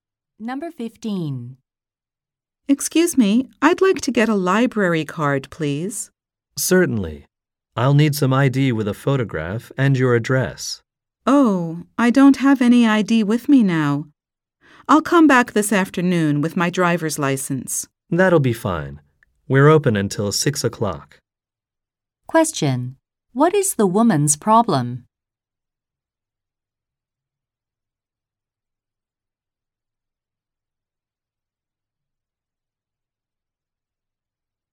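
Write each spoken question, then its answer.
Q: What is the woman's problem?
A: She doesn't have any ID with her.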